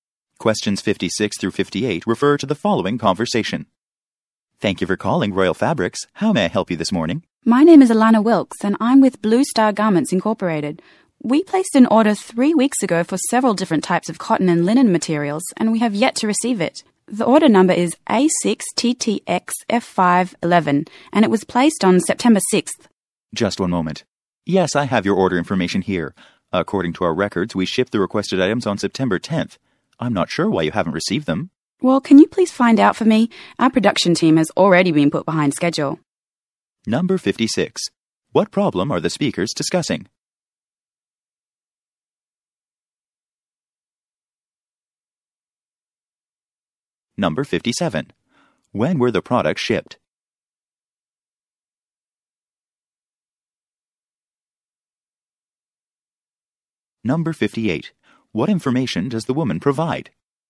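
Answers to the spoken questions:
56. An order has not been received
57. September 10th
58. The order number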